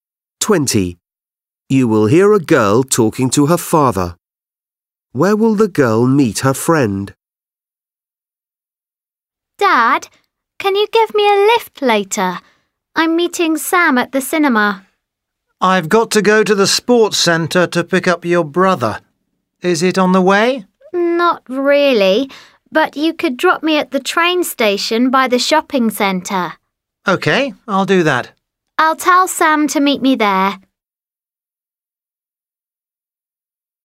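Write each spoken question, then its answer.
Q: Where will the girl meet her friend?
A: at the train station by the shopping centre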